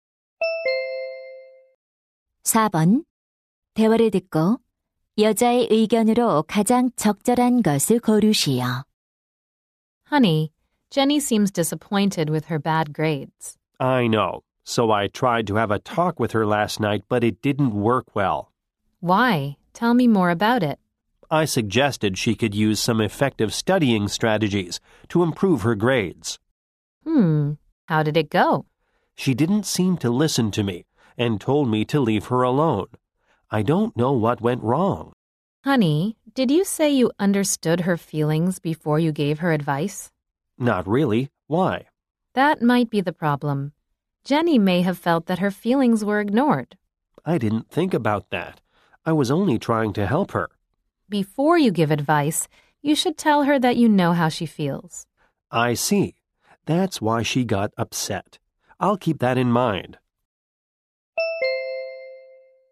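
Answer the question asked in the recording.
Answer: 조언하기 전에 자녀의 감정을 이해하고 있다고 말해 주어야 한다.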